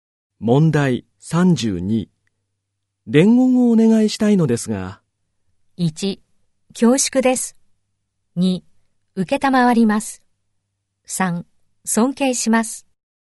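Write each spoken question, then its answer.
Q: 伝言をお願いしたいのですが。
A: 2: 受けたまわります。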